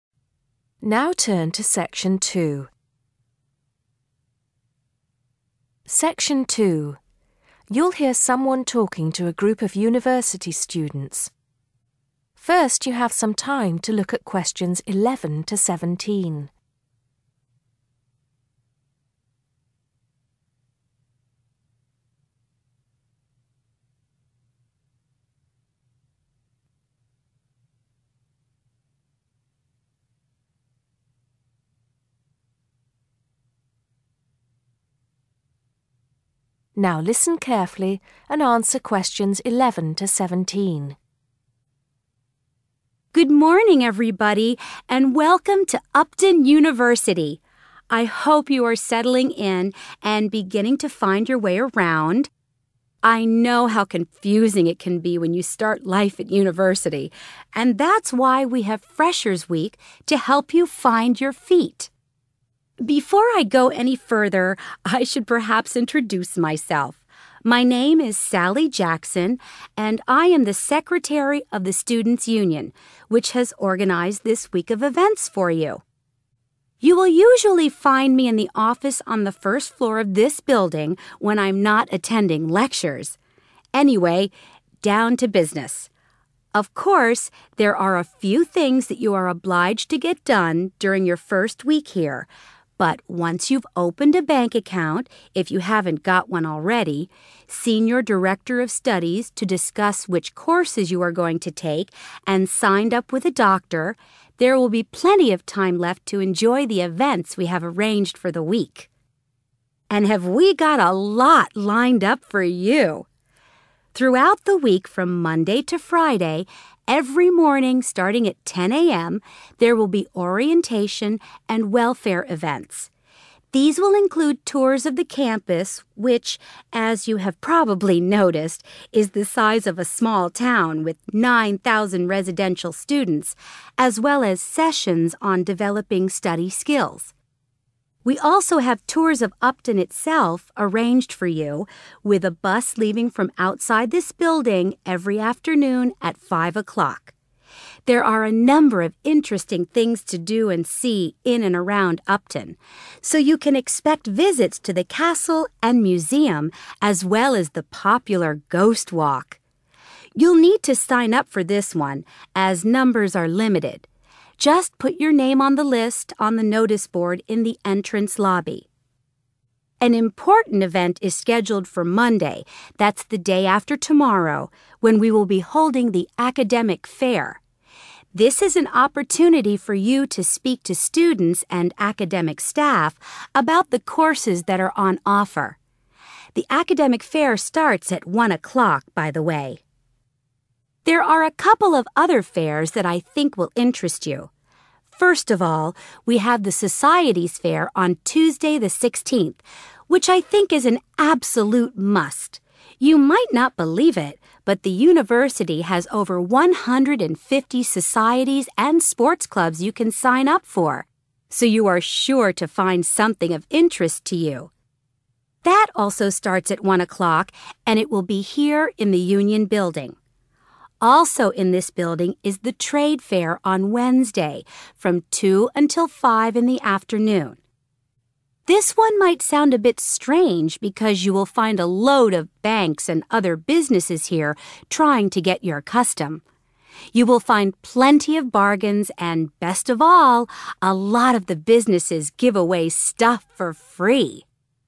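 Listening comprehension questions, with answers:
Write NO MORE THAN THREE WORDS AND/OR A NUMBER for each answer.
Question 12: What does Sally say about bank accounts?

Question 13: Sessions to develop (13) .....................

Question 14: Visit to (14) ..................... and Ghost walk.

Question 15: Talk to students and (15) .........................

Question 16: More than (16) .......................... societies and sports clubs.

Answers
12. Students must open one during the first week if they haven't got one already
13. study skills
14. castle and museum
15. academic staff
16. 150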